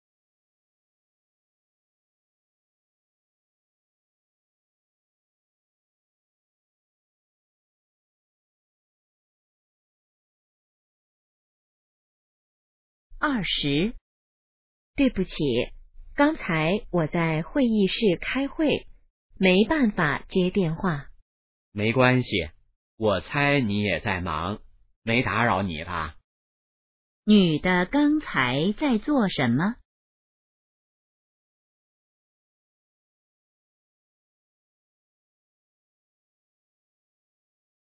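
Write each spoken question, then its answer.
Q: 女的刚才在做什么?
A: 开会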